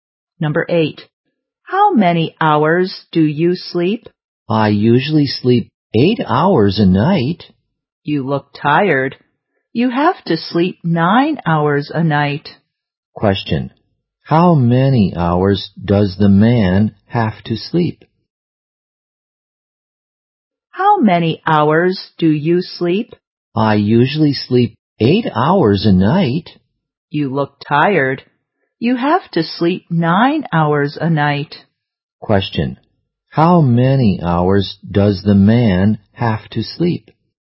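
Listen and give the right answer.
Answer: 9 hours a night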